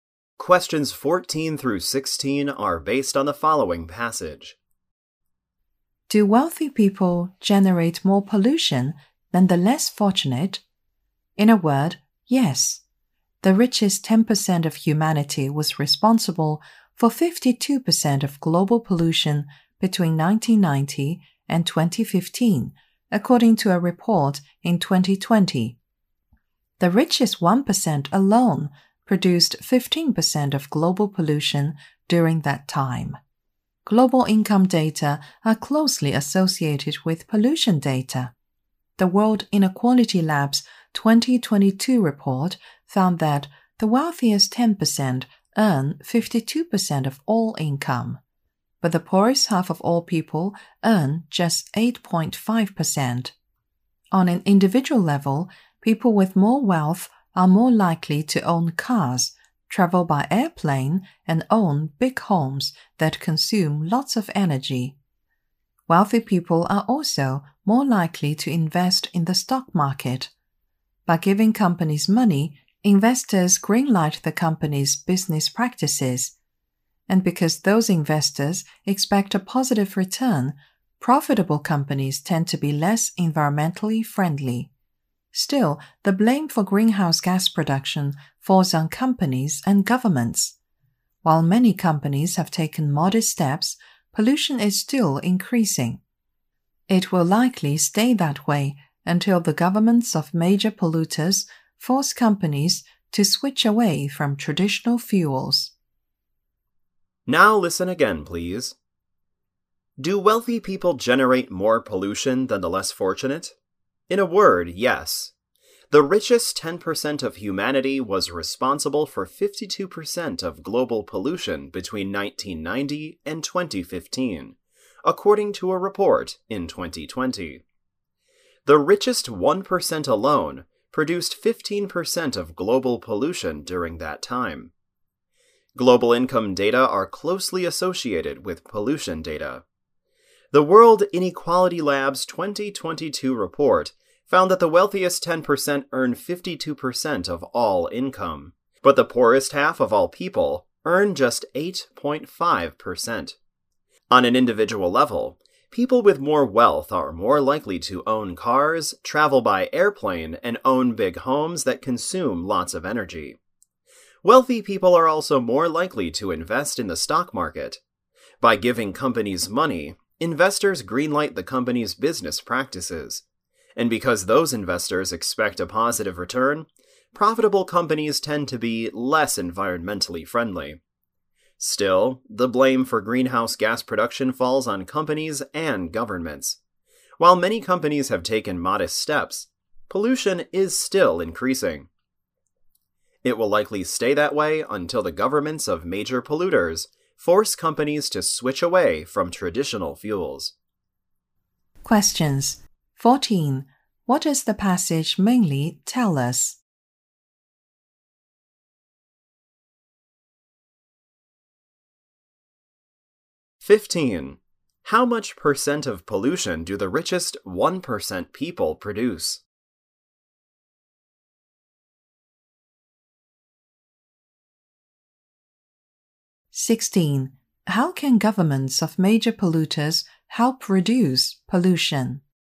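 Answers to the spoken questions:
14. Wealthy people generate more pollution
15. 15%
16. By forcing companies to switch away from traditional fuels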